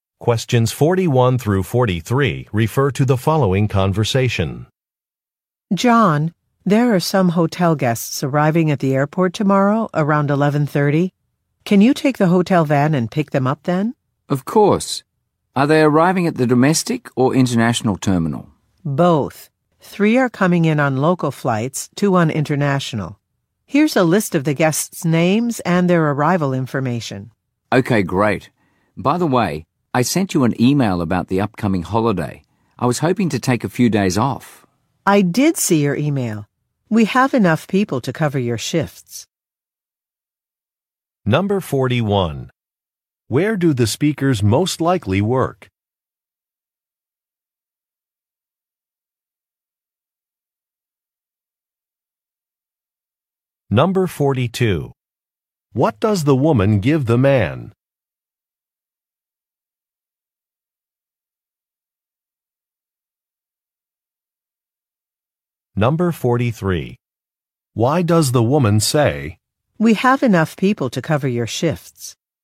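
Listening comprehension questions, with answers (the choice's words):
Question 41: Where do the speakers most likely work?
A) At an employment agency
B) At a rental car office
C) At a hospital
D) At a hotel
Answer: At a hotel

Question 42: What does the woman give the man?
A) Some flight information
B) Some meal vouchers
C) A map of local attractions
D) A parking permit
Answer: Some flight information

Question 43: Why does the woman say, "We have enough people to cover your shifts"?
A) To refuse an offer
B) To approve a request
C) To emphasize the importance of an assignment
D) To complain that an employee is late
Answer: To approve a request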